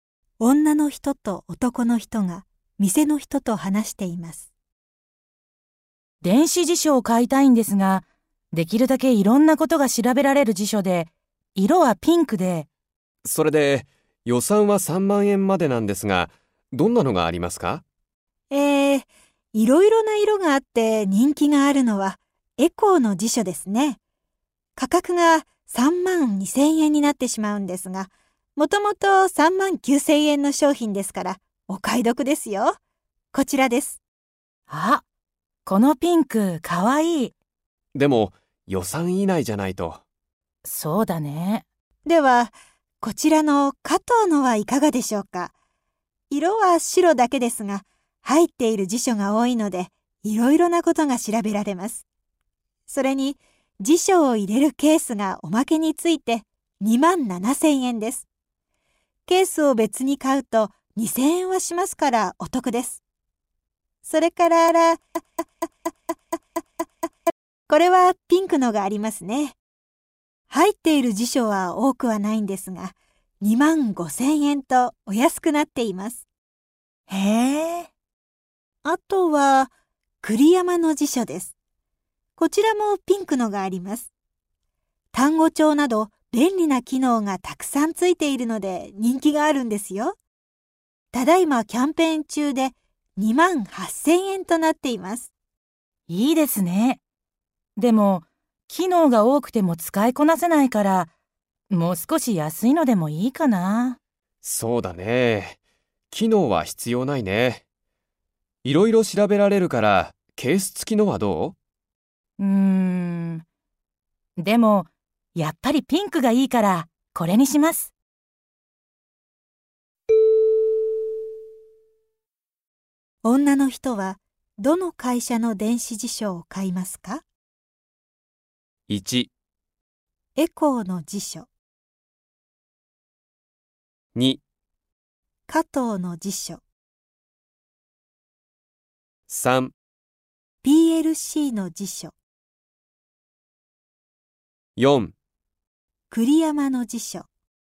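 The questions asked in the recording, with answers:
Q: 女の人はどの会社の電子辞書を買いますか?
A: 3: PLC の辞書。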